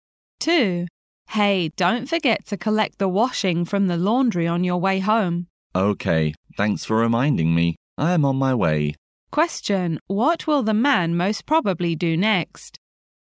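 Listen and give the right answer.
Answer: Collect the washing from the laundry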